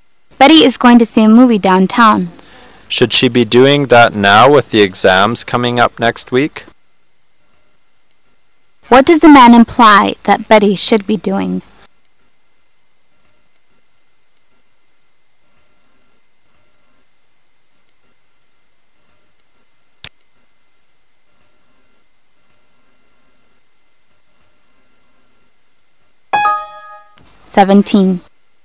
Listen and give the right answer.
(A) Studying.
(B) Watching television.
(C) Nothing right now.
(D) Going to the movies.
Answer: (A) Studying.

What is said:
A
[解析] W: Betty is going to see a movie downtown. M: Should she be doing that now with the exams coming up next week? Q: What does the man imply that Betty should be doing?